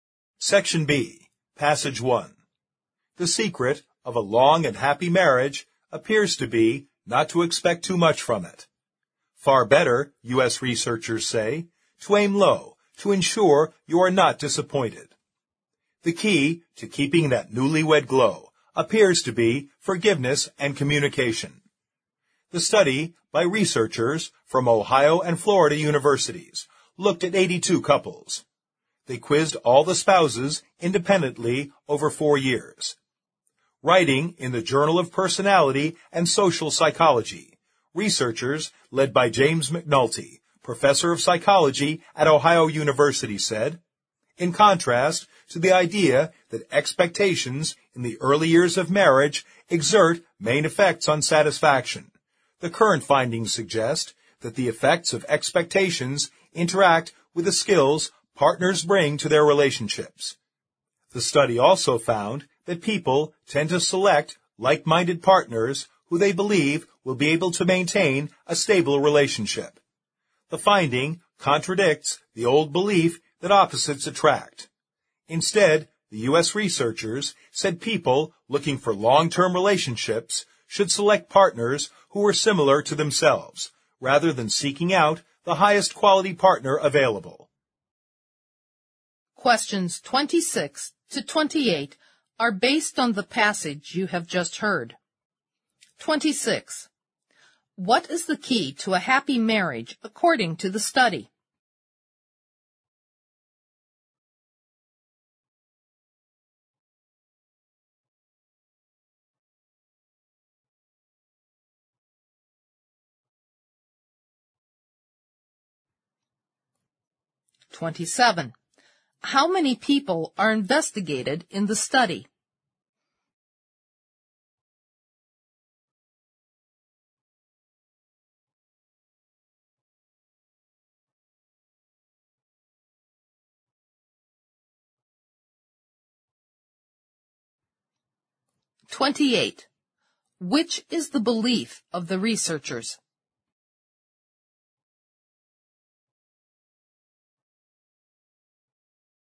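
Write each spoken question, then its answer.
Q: How many people are investigated in the study?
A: 164 people (82 couples)

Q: Which is the belief of the researchers?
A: People should choose partners who are similar to themselves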